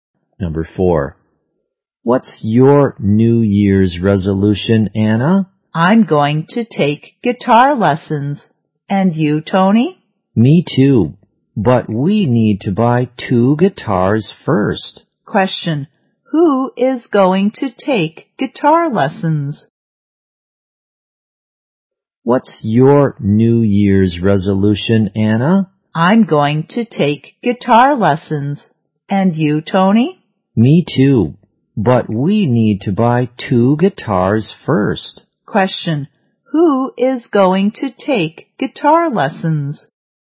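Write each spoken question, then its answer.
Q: who is going to take guitar lessons?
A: Anna and Tony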